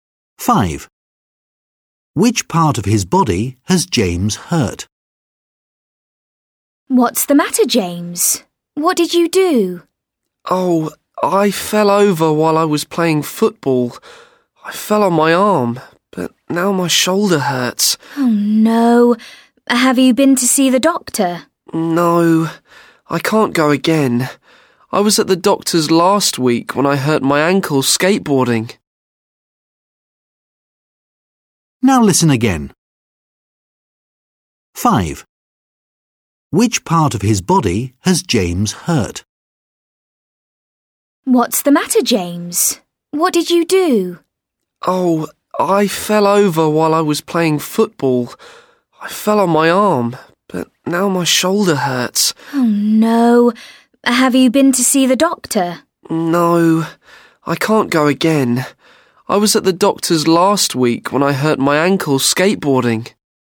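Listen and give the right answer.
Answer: his shoulder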